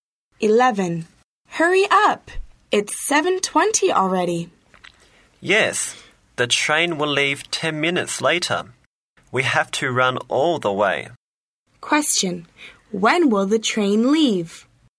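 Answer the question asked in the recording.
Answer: At 7:30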